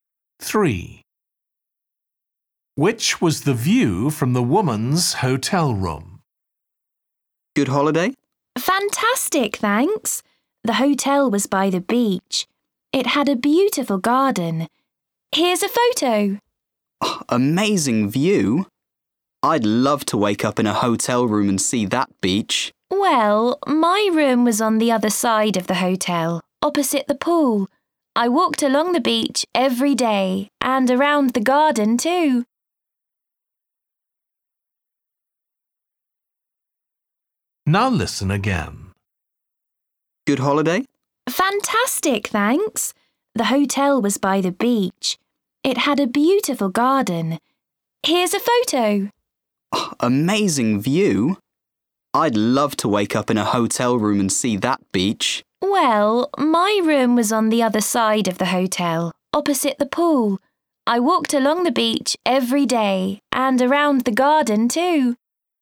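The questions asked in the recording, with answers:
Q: Which was the view from the woman's hotel room?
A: The pool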